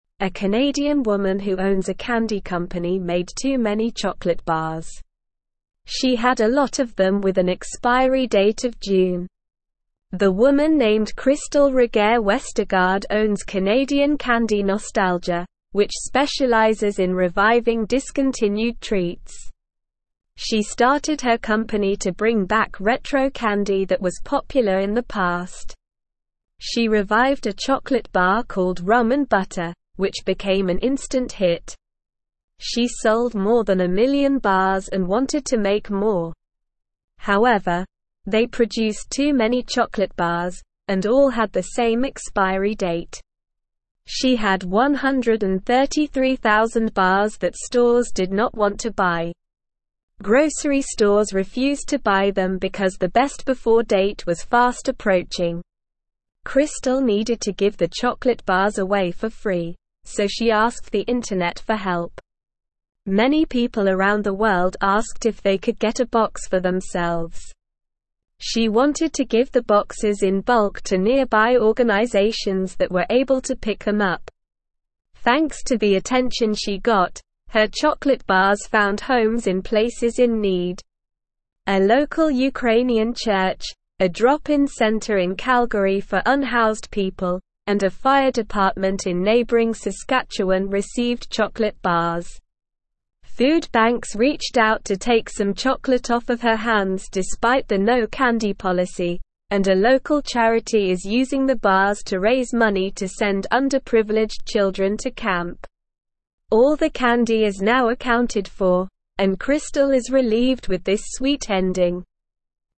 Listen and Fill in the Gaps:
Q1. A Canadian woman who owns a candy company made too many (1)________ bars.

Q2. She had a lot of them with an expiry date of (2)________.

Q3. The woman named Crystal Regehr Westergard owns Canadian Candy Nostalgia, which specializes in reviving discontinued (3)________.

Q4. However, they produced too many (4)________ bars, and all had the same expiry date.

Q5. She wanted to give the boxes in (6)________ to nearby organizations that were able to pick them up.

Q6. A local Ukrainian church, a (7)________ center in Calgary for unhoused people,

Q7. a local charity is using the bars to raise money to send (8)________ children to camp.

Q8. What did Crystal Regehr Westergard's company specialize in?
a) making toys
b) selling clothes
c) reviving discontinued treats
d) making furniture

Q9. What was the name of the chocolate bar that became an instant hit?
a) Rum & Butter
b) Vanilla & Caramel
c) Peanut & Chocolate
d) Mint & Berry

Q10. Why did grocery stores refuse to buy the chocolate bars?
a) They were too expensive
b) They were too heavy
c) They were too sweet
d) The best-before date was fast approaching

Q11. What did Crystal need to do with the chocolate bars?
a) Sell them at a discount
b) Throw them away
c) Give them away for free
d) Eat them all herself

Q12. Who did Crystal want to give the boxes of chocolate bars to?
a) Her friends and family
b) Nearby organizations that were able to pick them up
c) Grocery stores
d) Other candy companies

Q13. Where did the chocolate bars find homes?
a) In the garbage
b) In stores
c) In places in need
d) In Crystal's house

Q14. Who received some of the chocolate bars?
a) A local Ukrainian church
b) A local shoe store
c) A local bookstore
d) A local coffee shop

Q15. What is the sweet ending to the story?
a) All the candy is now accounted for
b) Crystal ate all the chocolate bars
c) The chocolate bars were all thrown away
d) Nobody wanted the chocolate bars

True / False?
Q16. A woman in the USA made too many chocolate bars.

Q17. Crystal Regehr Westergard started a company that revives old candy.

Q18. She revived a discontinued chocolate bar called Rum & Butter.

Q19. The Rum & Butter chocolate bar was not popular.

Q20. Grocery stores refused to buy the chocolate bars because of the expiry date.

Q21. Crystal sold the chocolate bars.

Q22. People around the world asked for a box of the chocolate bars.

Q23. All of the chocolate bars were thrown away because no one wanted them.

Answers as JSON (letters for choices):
{"1": "chocolate", "2": "June", "3": "treats", "4": "chocolate", "5": "bulk", "6": "drop-in", "7": "underprivileged", "8": "c", "9": "a", "10": "d", "11": "c", "12": "b", "13": "c", "14": "a", "15": "a", "16": "False", "17": "True", "18": "True", "19": "False", "20": "True", "21": "False", "22": "True", "23": "False"}

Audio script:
A Canadian woman who owns a candy company made too many chocolate bars. She had a lot of them with an expiry date of June. The woman named Crystal Regehr Westergard owns Canadian Candy Nostalgia, which specializes in reviving discontinued treats. She started her company to bring back retro candy that was popular in the past. She revived a chocolate bar called Rum & Butter, which became an instant hit. She sold more than a million bars and wanted to make more. However, they produced too many chocolate bars, and all had the same expiry date. She had 133,000 bars that stores did not want to buy. Grocery stores refused to buy them because the best-before date was fast approaching.
Crystal needed to give the chocolate bars away for free, so she asked the internet for help. Many people around the world asked if they could get a box for themselves. She wanted to give the boxes in bulk to nearby organizations that were able to pick them up. Thanks to the attention she got, her chocolate bars found homes in places in need. A local Ukrainian church, a drop-in center in Calgary for unhoused people, and a fire department in neighboring Saskatchewan received chocolate bars. Food banks reached out to take some chocolate off of her hands despite the no-candy policy, and a local charity is using the bars to raise money to send underprivileged children to camp. All the candy is now accounted for, and Crystal is relieved with this sweet ending.

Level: Level 1